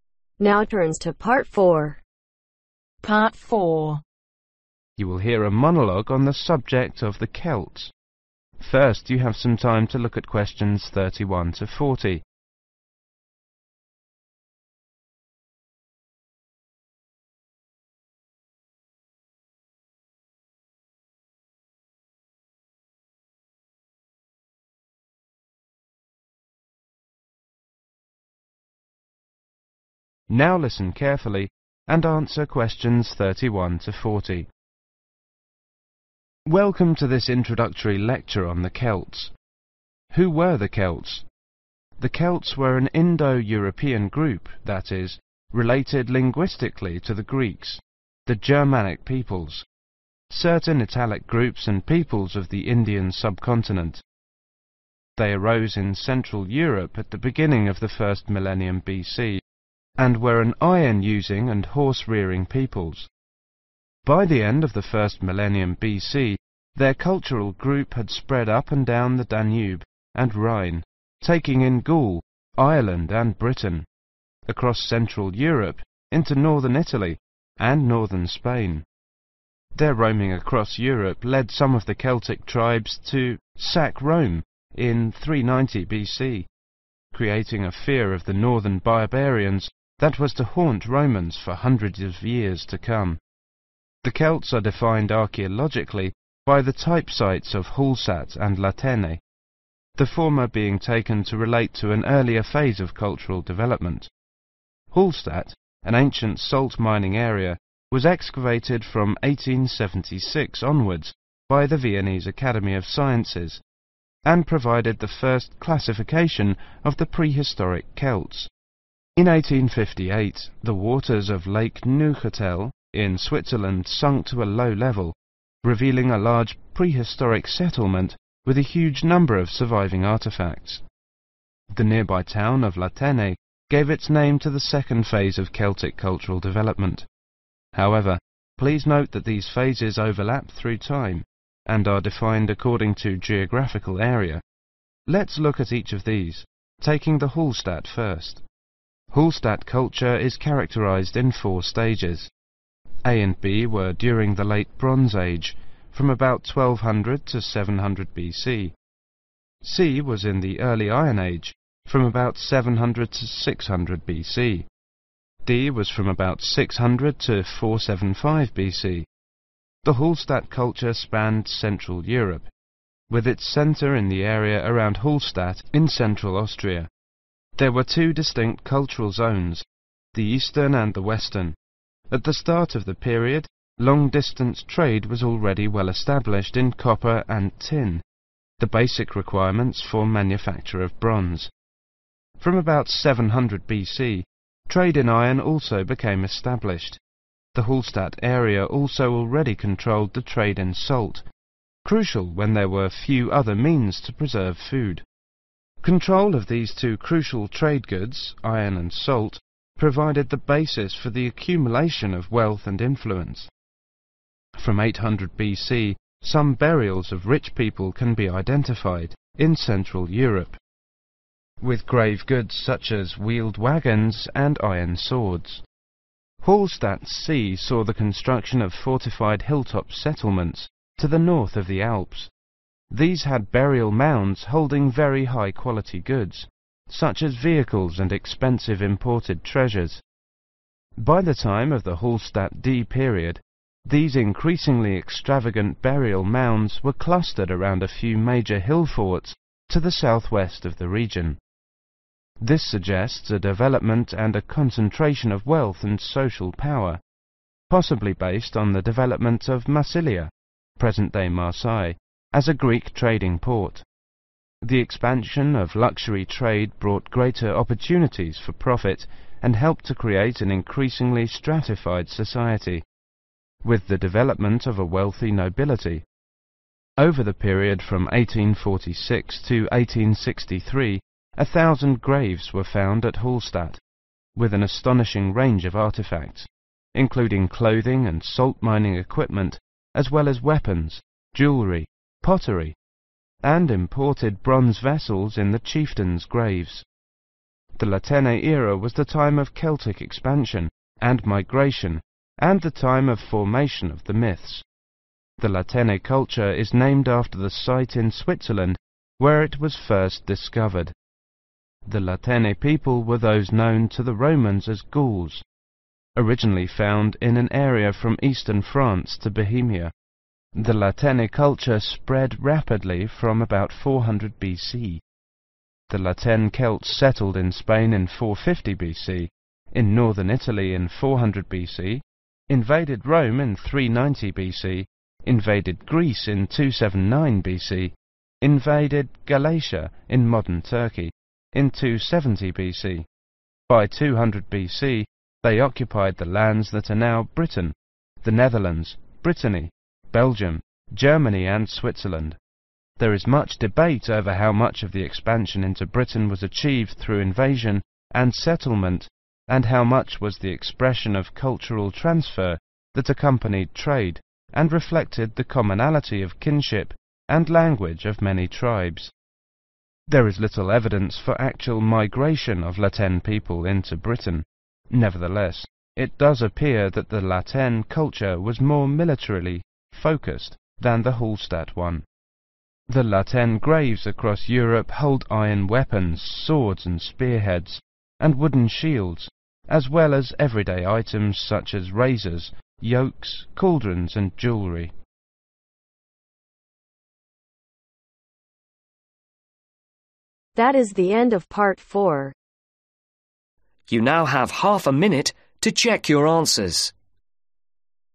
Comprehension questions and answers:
Complete the information below. Write ONE WORD OR A NUMBER for each answer.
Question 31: Which metal were the Celts using at the beginning of the first millennium B.C ?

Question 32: When did excavation at Hallstatt begin ? ........................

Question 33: When were Celtic remains near La Tene uncovered ? .....................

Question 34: How many periods of Hallstatt culture were there ? .....................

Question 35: Two items were traded over long distances at the beginning of the Hallstatt period...................... and tin.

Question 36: Where were settlements built during the Hallstatt C period ? ...................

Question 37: What led to a stratified society luxury ? ....................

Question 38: Celtic ....................... and migration took place during the La Tene period.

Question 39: After 400 B.C the La Tene culture ...................... rapidly.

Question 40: Weapons and everyday items can be found in La Tene .................... across Europe.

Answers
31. iron
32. 1876
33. 1858
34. 4
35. copper
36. hilltop
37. trade
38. expansion
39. spread
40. graves